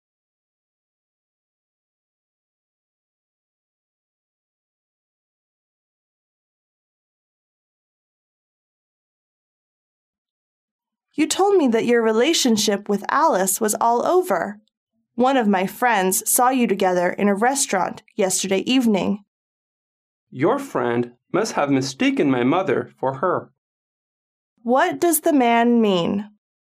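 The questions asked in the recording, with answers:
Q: What does the man mean?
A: The woman the friend saw was his mother, not Alice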